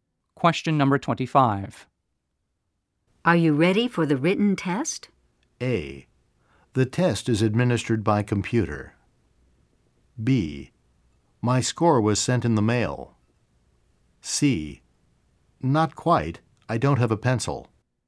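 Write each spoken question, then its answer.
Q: Are you ready for the written test?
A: C: Not quite. I don't have a pencil.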